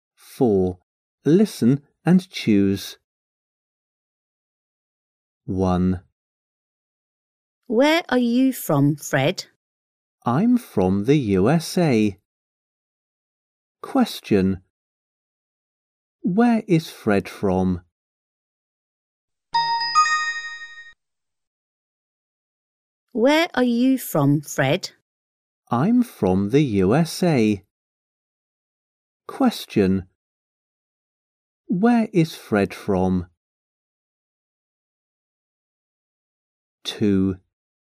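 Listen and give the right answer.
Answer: the USA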